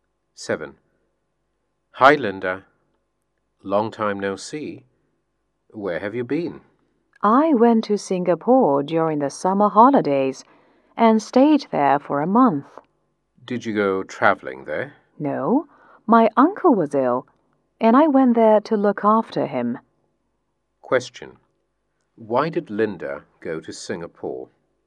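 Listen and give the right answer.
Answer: To look after her uncle, who was ill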